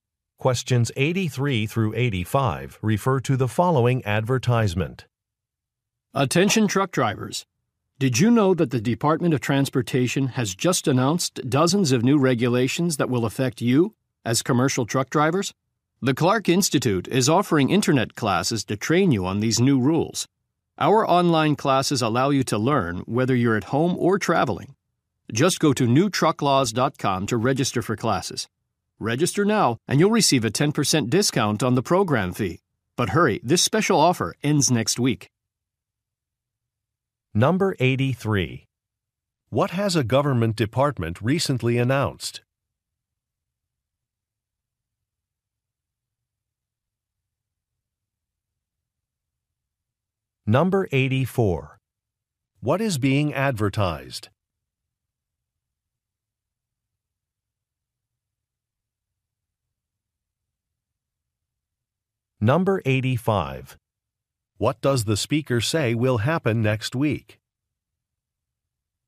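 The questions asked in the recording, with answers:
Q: What has a government department recently announced?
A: New regulations for truck drivers

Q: What is being advertised?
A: Online training classes

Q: What does the speaker say will happen next week?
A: A discount offer will end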